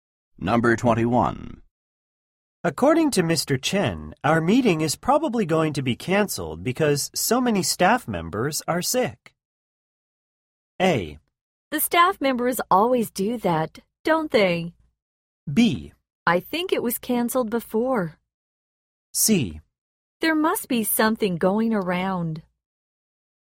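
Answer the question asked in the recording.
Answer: C: There must be something going around.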